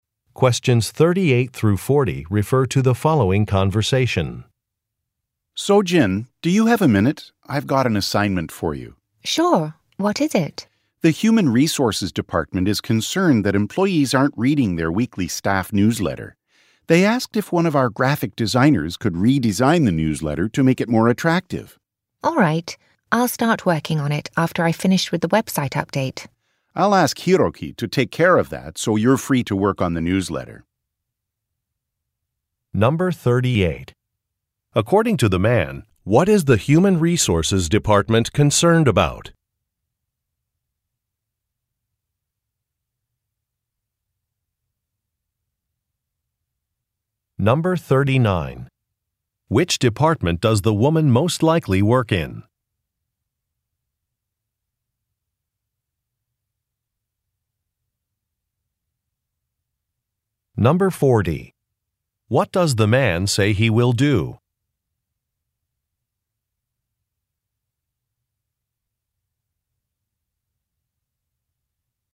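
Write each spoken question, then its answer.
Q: According to the man, what is the Human Resources Department concerned about?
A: Employees aren't reading the weekly staff newsletter

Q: Which department does the woman most likely work in?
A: Graphic design

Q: What does the man say he will do?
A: Ask Hiroki to take care of the website update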